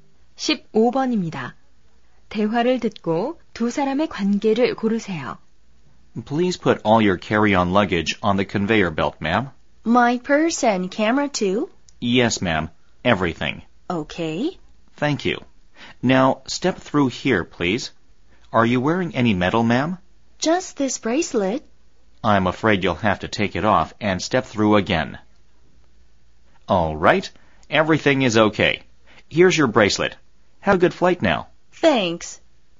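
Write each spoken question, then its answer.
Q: 대화를 듣고 두 사람의 관계를 고르세요.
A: 공항 보안 검색 요원과 승객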